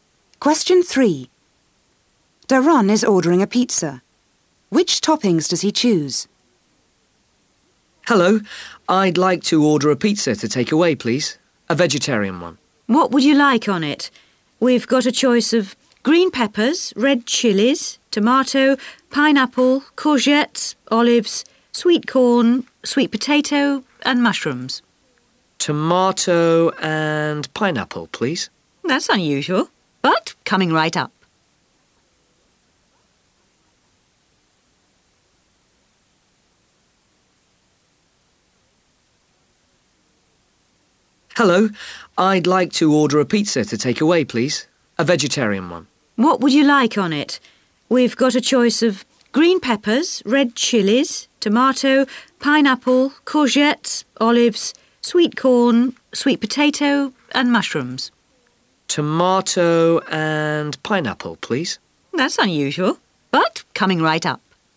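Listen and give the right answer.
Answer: Tomato and pineapple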